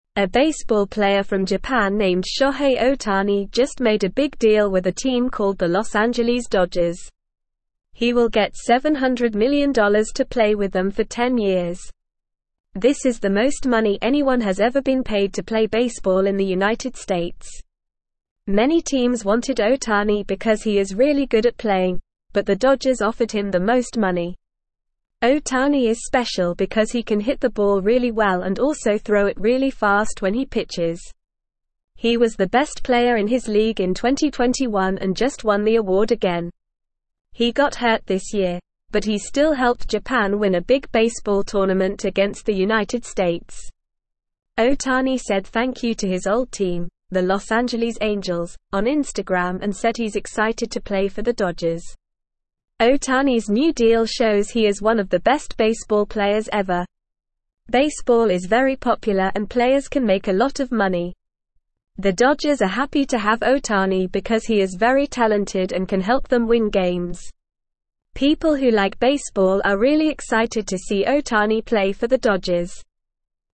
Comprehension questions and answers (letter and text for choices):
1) Who is the baseball player that made a big deal with the Los Angeles Dodgers?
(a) Ichiro Suzuki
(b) Hideki Matsui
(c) Yu Darvish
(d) Shohei Ohtani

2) How much money will Shohei Ohtani get to play with the Los Angeles Dodgers?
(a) $500 million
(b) $700 million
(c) $1 billion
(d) $300 million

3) What makes Shohei Ohtani special as a baseball player?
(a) He can run very fast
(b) He can catch the ball really well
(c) He can hit the ball well and throw it fast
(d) He can play multiple sports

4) What award did Shohei Ohtani win in 2021?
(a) Best pitcher in the league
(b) Most home runs in a season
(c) Best player in his league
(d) Most stolen bases in a season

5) Which team did Shohei Ohtani play for before joining the Los Angeles Dodgers?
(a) New York Yankees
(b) Los Angeles Angels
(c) Boston Red Sox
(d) Chicago Cubs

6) What did Shohei Ohtani say on Instagram to his old team, the Los Angeles Angels?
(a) Goodbye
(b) I'm sorry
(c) I don't want to play for you anymore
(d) Thank you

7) What does Shohei Ohtani's new deal show about him?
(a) He is one of the best baseball players ever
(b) He is not a very good baseball player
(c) He is not interested in playing baseball anymore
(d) He is going to retire soon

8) Why are the Los Angeles Dodgers happy to have Shohei Ohtani?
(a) He is very talented and can help them win games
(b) He is not a good player and won't make a difference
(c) He is a good player, but they don't really need him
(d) He is a famous player and will bring more fans to the games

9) The Dodgers are not thrilled to have Ohtani on their team because he is not incredibly talented and cannot help them win games.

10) The contract is not worth $700 million and will not last for 10 years.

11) This is not the highest amount of money ever paid to a baseball player in the United States.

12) Although he got injured this year, Ohtani helped Japan win a big baseball tournament against the United States.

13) Ohtani expressed his gratitude to his old team, the Los Angeles Angels, on Facebook and is not excited to play for the Dodgers.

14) Ohtani is known for being both a great hitter and a fast pitcher.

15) In 2021, he was the best player in his league and recently won the same award again.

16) Shohei Ohtani, a baseball player from Japan, has signed a contract with the Los Angeles Dodgers.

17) A baseball (1)______ from Japan named Shohei Ohtani just made a big (2)______ with a team called the Los Angeles (3)______.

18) A baseball (1)______ from Japan named Shohei Ohtani just made a big (2)______ with a team called the Los Angeles (3)______.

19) A baseball (1)______ from Japan named Shohei Ohtani just made a big (2)______ with a team called the Los Angeles (3)______.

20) Many teams wanted (4)______ because he is really good at playing, but the Dodgers offered him the most money.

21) Ohtani is special because he can hit the (5)______ really well and also throw it really fast when he pitches.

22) He was the (6)______ player in his league in 2021 and just won the award again.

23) He got (7)______ this year, but he still helped Japan win a big baseball tournament against the (8)______ States.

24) He got (7)______ this year, but he still helped Japan win a big baseball tournament against the (8)______ States.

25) Ohtani said thank you to his old team, the Los Angeles Angels, on (9)______ and said he's excited to play for the Dodgers.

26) The Dodgers are happy to have Ohtani because he is very (10)______ and can help them win games.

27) (11)______ who (12)______ baseball are really excited to see Ohtani play for the Dodgers.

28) (11)______ who (12)______ baseball are really excited to see Ohtani play for the Dodgers.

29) Who is the baseball player from Japan who made a big deal with the Los Angeles Dodgers?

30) How much money will Shohei Ohtani get to play with the Dodgers?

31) Why did many teams want Ohtani?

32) What makes Ohtani special as a baseball player?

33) What happened to Ohtani this year?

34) Who did Ohtani say thank you to on Instagram?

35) Why are the Dodgers happy to have Ohtani on their team?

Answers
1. (d) Shohei Ohtani
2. (b) $700 million
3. (c) He can hit the ball well and throw it fast
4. (c) Best player in his league
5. (b) Los Angeles Angels
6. (d) Thank you
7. (a) He is one of the best baseball players ever
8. (a) He is very talented and can help them win games
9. False
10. False
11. False
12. True
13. False
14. True
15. True
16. True
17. player
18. deal
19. Dodgers
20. Ohtani
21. ball
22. best
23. hurt
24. United
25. Instagram
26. talented
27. People
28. like
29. Shohei Ohtani.
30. He will get $700 million.
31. Because he is really good at playing baseball.
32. He can hit the ball really well and throw it really fast when he pitches.
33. He got hurt.
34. He said thank you to his old team, the Los Angeles Angels.
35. Because he is very talented and can help them win games.

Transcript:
A baseball player from Japan named Shohei Ohtani just made a big deal with a team called the Los Angeles Dodgers. He will get $700 million to play with them for 10 years. This is the most money anyone has ever been paid to play baseball in the United States. Many teams wanted Ohtani because he is really good at playing, but the Dodgers offered him the most money.
Ohtani is special because he can hit the ball really well and also throw it really fast when he pitches. He was the best player in his league in 2021 and just won the award again. He got hurt this year, but he still helped Japan win a big baseball tournament against the United States. Ohtani said thank you to his old team, the Los Angeles Angels, on Instagram and said he's excited to play for the Dodgers.
Ohtani's new deal shows he is one of the best baseball players ever. Baseball is very popular and players can make a lot of money. The Dodgers are happy to have Ohtani because he is very talented and can help them win games. People who like baseball are really excited to see Ohtani play for the Dodgers.

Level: Level 2